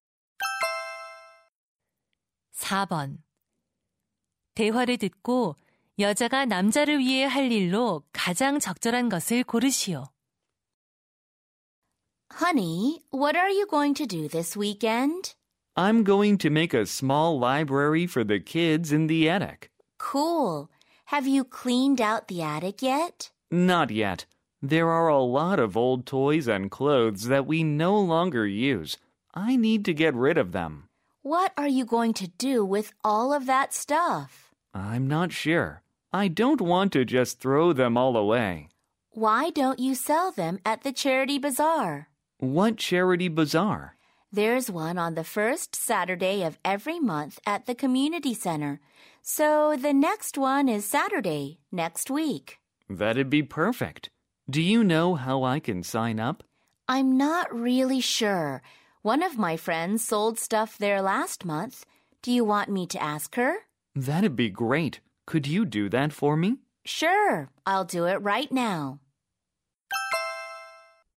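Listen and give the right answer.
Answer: 자선 바자회 참가 신청 방법을 친구에게 물어보기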